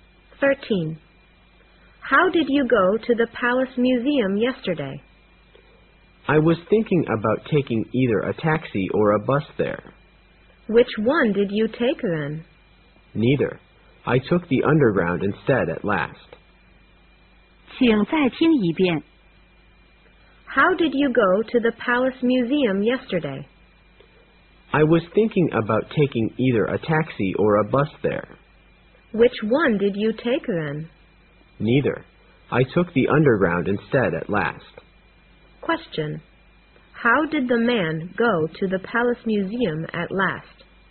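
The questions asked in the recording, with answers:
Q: How did the man go to the Palace Museum at last?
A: By underground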